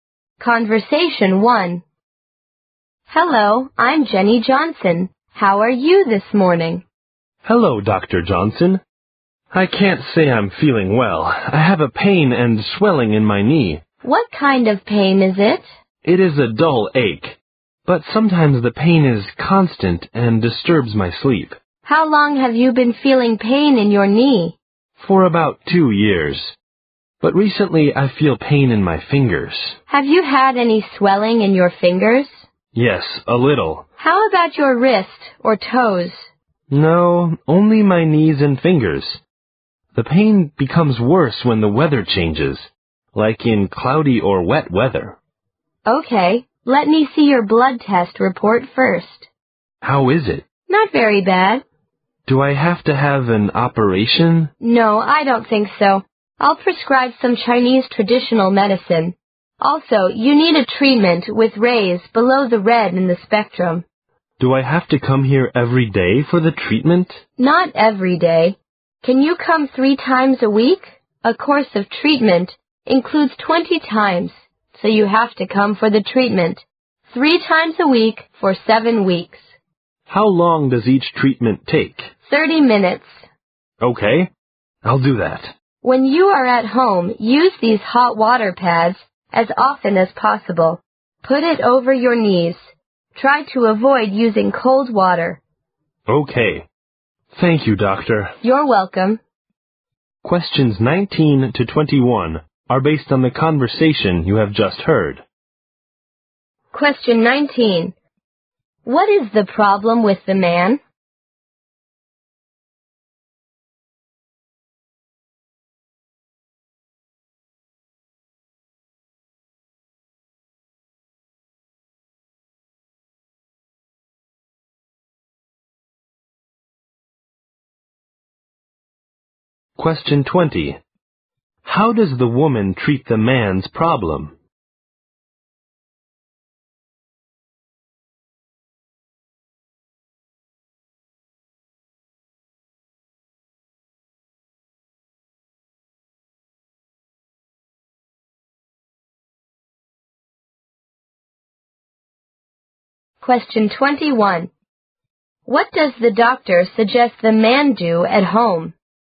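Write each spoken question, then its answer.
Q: What is the problem with the man?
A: Pain and swelling in his knee and fingers

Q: How does the woman treat the man's problem?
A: With Chinese traditional medicine and infrared ray treatment

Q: What does the doctor suggest the man do at home?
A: Use hot water pads on his knees and avoid cold water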